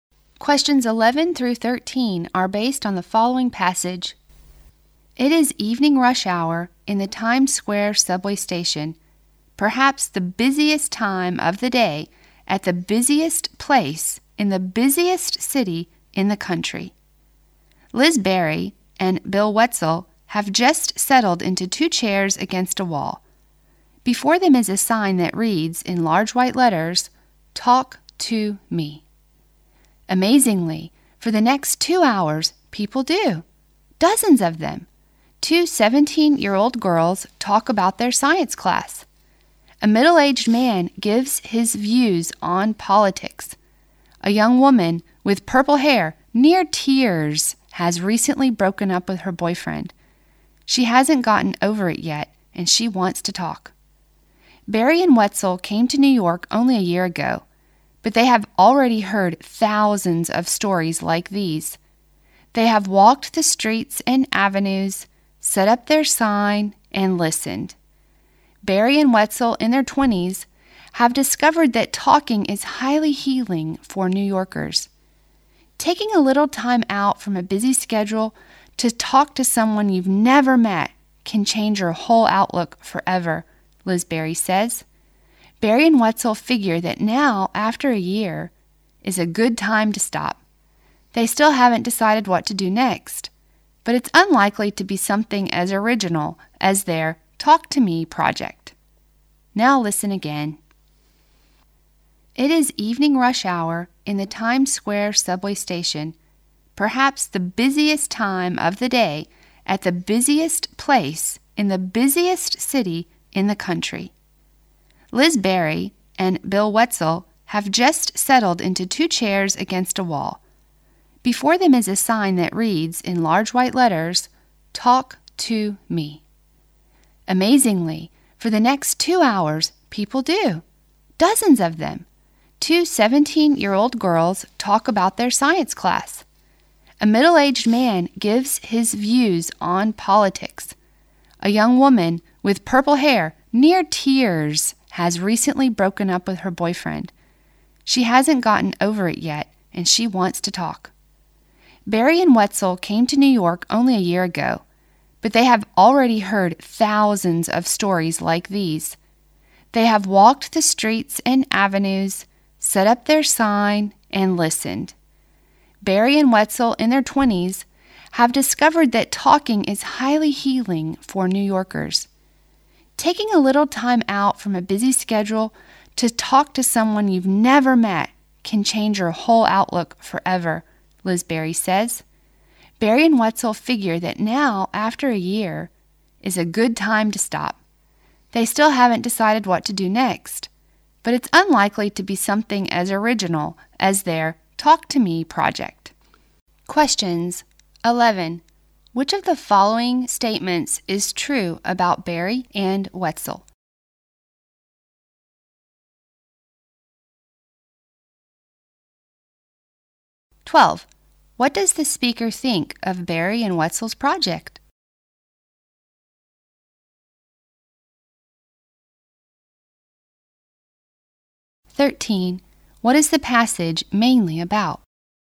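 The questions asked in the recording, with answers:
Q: What is the passage mainly about?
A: The Talk to Me project, where strangers in New York talk to two listeners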